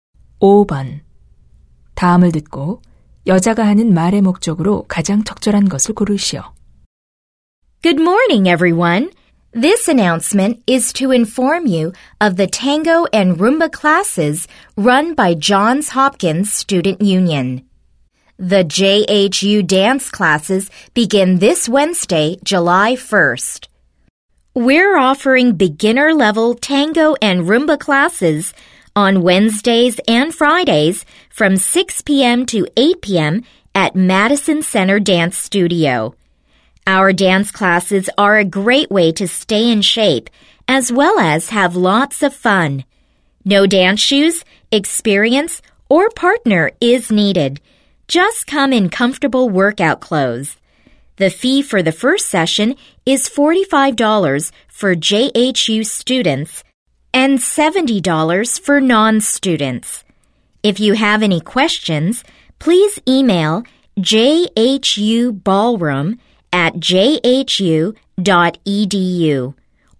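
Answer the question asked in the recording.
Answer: 탱고와 룸바 댄스 강좌를 홍보하려고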